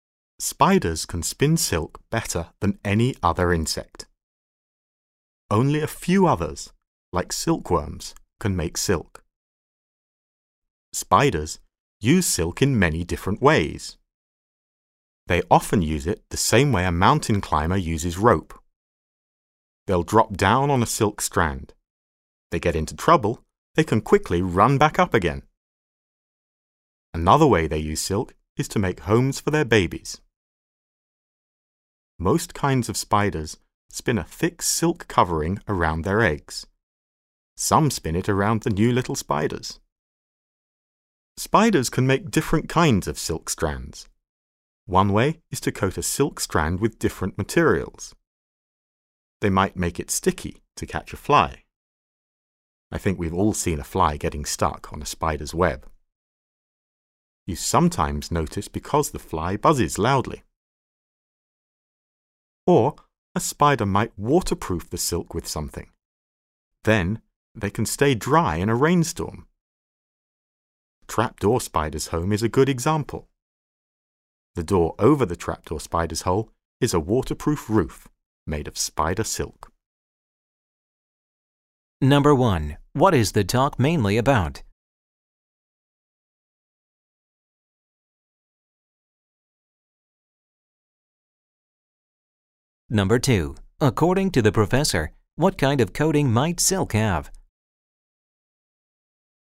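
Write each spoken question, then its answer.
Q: What is the talk mainly about?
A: How spiders make and use silk

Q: According to the professor, what kind of coating might silk have?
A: A sticky or waterproof coating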